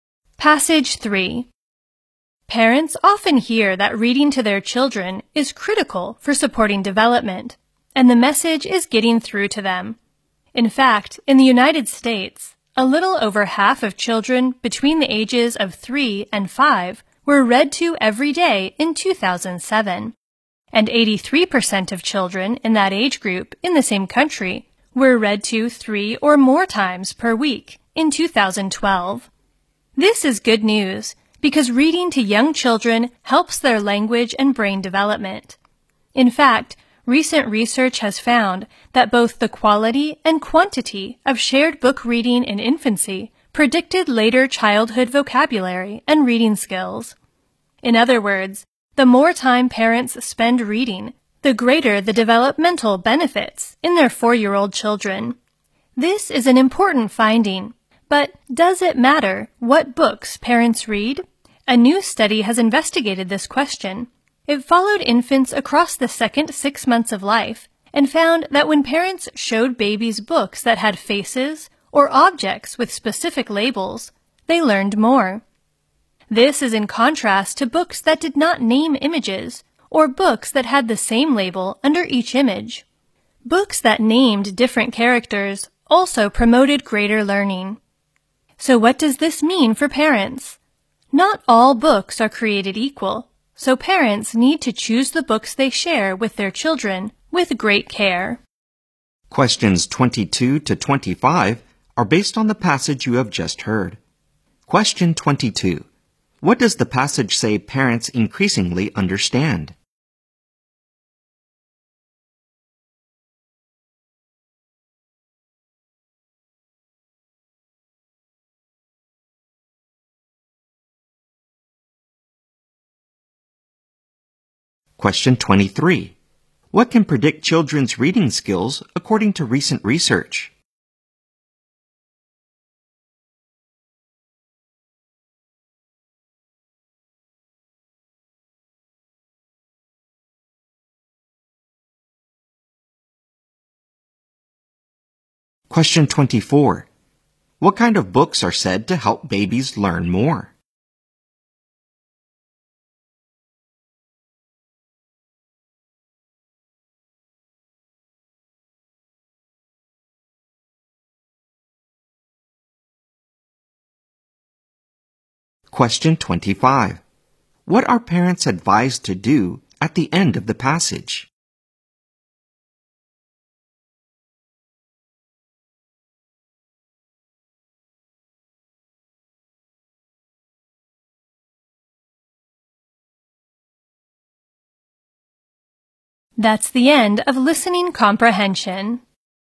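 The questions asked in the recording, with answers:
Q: What does the passage say parents increasingly understand?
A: Reading to children is critical for their development

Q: What can predict children's reading skills according to recent research?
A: The quality and quantity of shared book reading in infancy

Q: What kind of books are said to help babies learn more?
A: Books with faces or objects with specific labels

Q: What are parents advised to do at the end of the passage?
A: Choose the books they share with their children with great care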